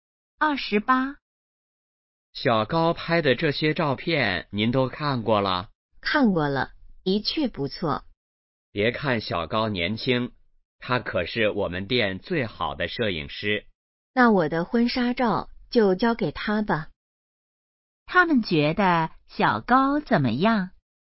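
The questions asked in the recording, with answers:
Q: 他们觉得小高怎么样?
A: 照片拍得好,是最好的摄影师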